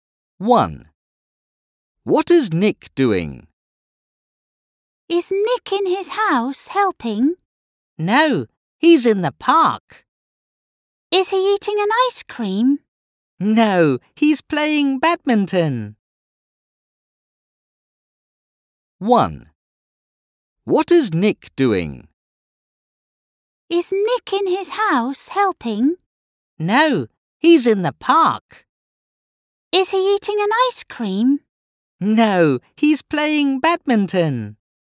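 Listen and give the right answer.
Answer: Playing badminton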